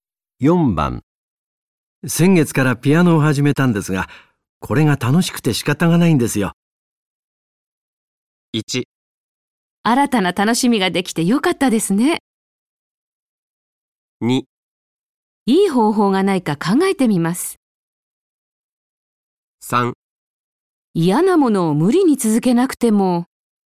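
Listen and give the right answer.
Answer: 1: 新たな楽しみができてよかったですね。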